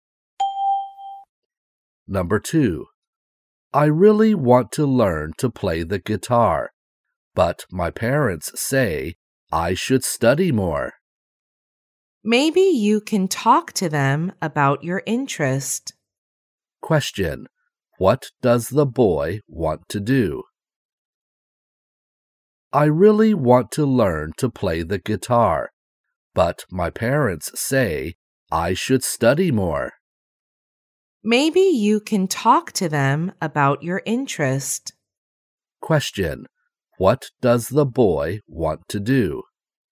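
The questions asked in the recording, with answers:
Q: What does the boy want to do?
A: Learn to play the guitar.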